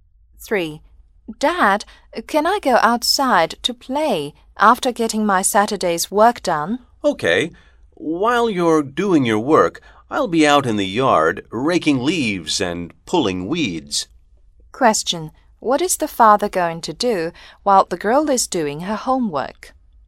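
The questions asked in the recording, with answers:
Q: What is the father going to do while the girl is doing her homework?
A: Rake leaves and pull weeds in the yard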